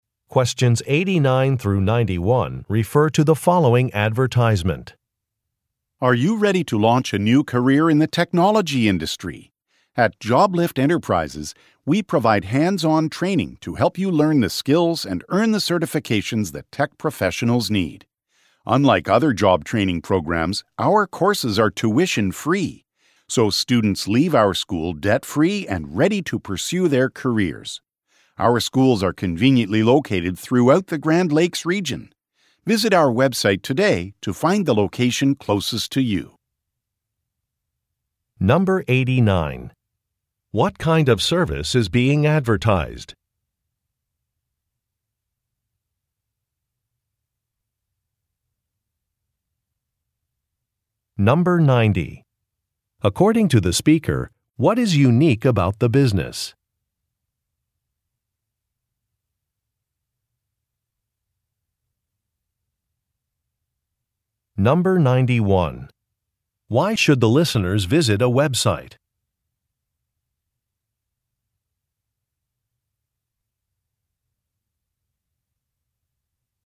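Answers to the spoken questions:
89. Job training in technology
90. Its courses are tuition-free
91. To find the nearest school location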